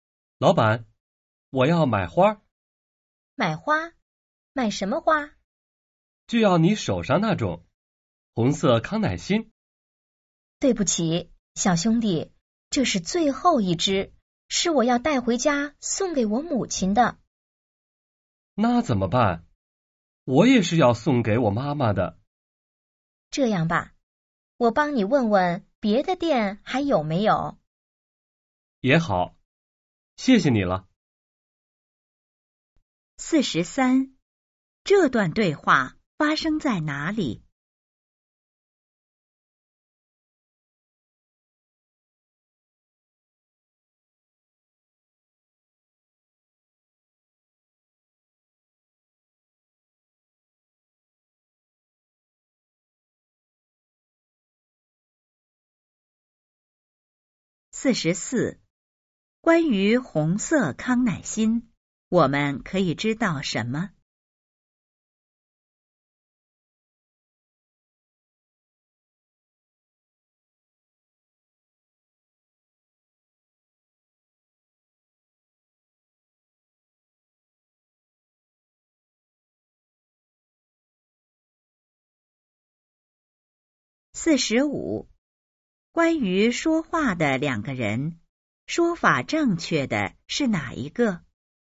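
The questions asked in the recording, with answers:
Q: 这段对话发生在哪里?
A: 花店

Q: 关于红色康乃馨,我们可以知道什么?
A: 只剩最后一枝,老板要送给自己的母亲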